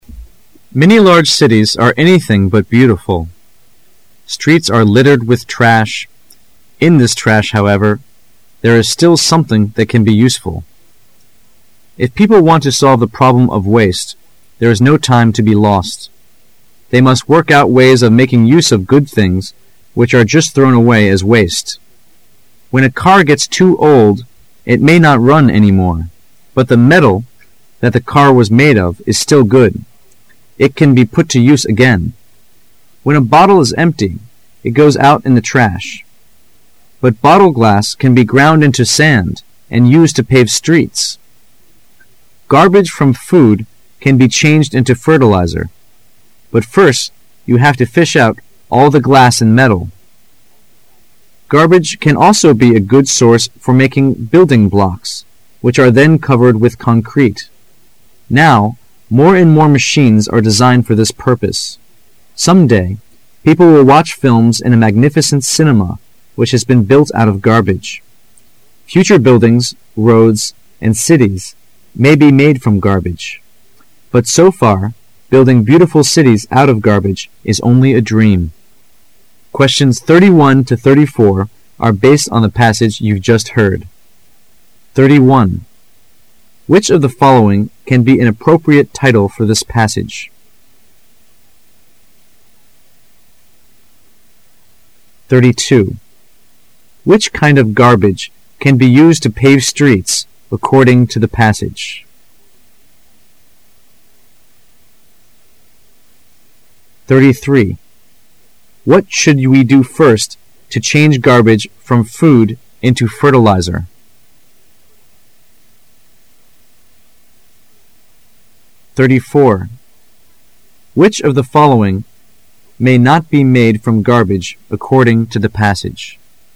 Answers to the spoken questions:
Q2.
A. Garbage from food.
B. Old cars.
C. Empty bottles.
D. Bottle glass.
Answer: D. Bottle glass.
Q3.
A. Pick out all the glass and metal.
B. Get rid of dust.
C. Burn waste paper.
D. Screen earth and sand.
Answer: A. Pick out all the glass and metal.
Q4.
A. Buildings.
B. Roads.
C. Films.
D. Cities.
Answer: C. Films.

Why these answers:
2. Which kind of garbage can be used to pave streets according to the passage? [试题分析]本题考查辨听明示信息的能力。 [关键词语]bottle glass,be ground into sand,pave streets [详细解答]文中可听到:But bottle glass can be ground into sand and used to pave streets.故选D。
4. Which of the following may not be made from garbage according to the passage? [试题分析]本题考查推理能力。根据细节内容和选项判断。 [关键词语]buildings,roads,cities [详细解答]最后可以听到:Future buildings。roads.and cities may be made from garbage.其中没有提到films,故选C。

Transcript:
[解析] 31-34 Many large cities are anything but beautiful. Streets are littered with trash. In this trash, however, there is still something that can be useful. If people want to solve the problem of waste, there is no time to be lost. They must work out ways of making use of good things which are just thrown away as waste. When a car gets too old, it may not run any more. But the metal that the car was made of is still good. It can be put to use again. When a bottle is empty, it goes out in the trash. But bottle glass can be ground into sand and used to pave streets. Garbage from food can be changed into fertilizer. But first you have to fish out all the glass and metal. Garbage can also be a good source for making building blocks, which are then covered with concrete. Now, more and more machines are designed for this purpose. Some day, people will watch films in a magnificent cinema which has been built out of garbage. Future buildings, roads, and cities may be made from garbage. But so far, building beautiful cities out of garbage is only a dream. Which of the following can be an appropriate title for the passage?